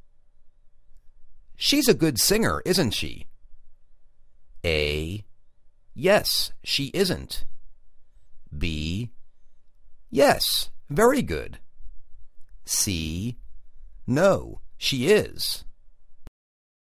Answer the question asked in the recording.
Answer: Yes, very good